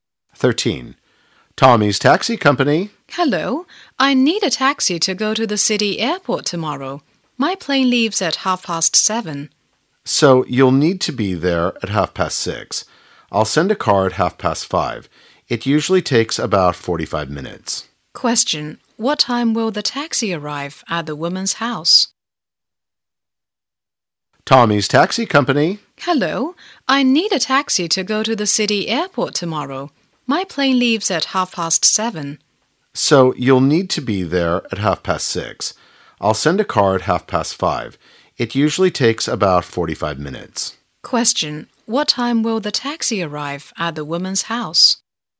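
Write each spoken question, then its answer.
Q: What time will the taxi arrive at the woman's house?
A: At 5:30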